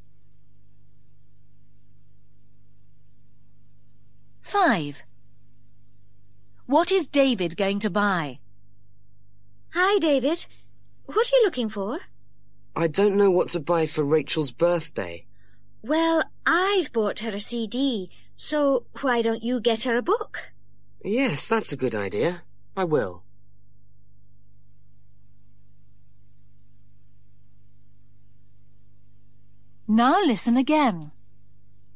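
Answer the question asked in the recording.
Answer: A book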